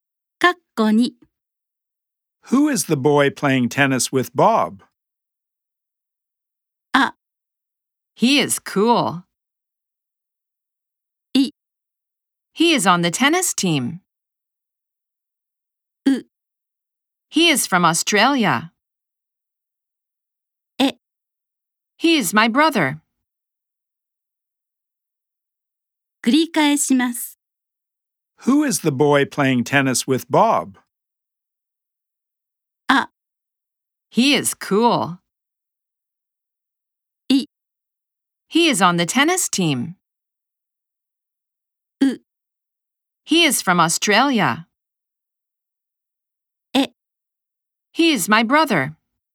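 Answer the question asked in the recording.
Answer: え: He is my brother.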